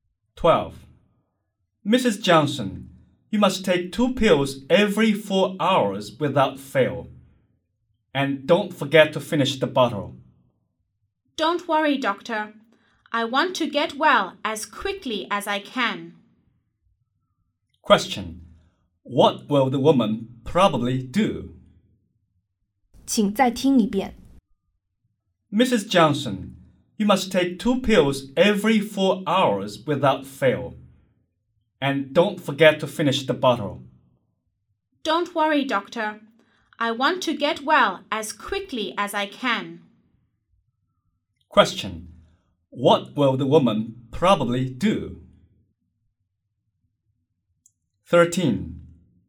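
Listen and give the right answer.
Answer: Take the pills as the doctor told her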